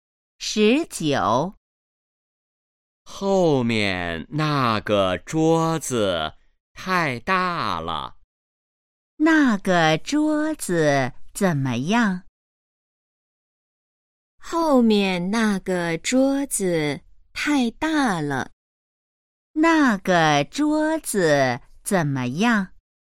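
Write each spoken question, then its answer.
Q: 那个桌子怎么样?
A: 太大了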